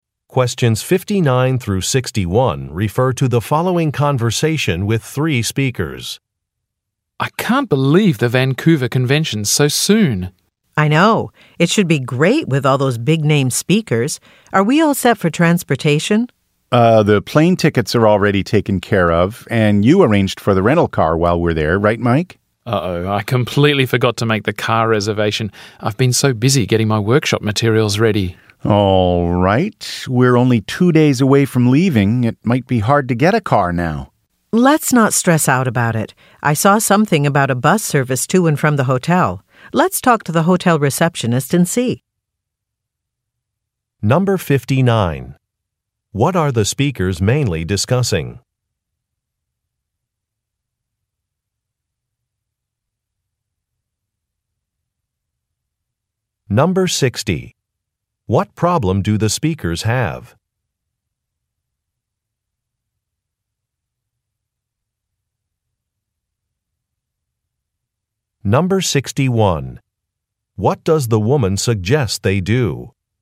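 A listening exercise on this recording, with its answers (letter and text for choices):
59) What are the speakers mainly discussing?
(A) Ways to reduce a travel budget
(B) Places to visit in Vancouver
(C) Possible locations for a conference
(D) Plans for an upcoming business trip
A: (D) Plans for an upcoming business trip

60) What problem do the speakers have?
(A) Their business cards have not arrived.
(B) Their reservations are for the wrong dates.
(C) Their transportation arrangements are not complete.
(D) Their client in Vancouver is unavailable.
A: (C) Their transportation arrangements are not complete.

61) What does the woman suggest they do?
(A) Cancel an order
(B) Contact a hotel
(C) Prepare a speech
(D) Postpone a decision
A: (B) Contact a hotel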